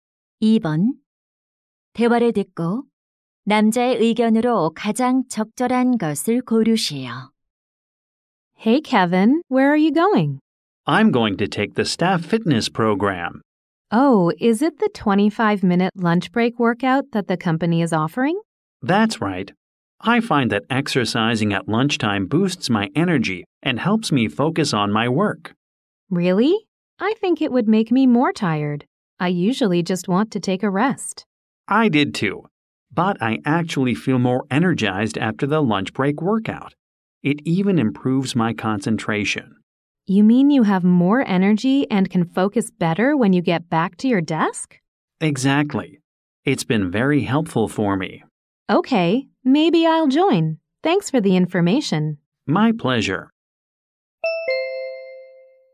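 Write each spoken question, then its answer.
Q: 대화를 듣고 남자의 의견으로 가장 적절한 것을 고르시오.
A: 점심시간 운동은 활력과 집중력을 높여 준다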